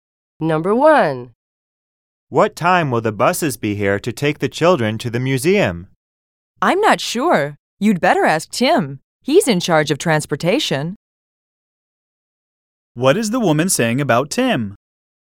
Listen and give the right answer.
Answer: When the woman says that Tim is in charge of transportation, she means that he's the one who is taking care of organizing the buses.